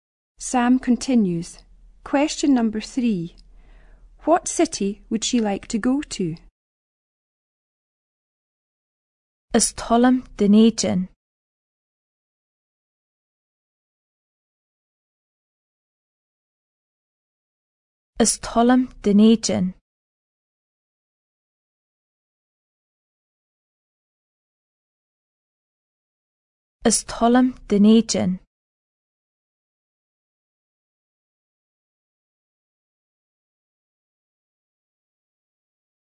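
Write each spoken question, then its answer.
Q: What city would she like to go to?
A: Dunedin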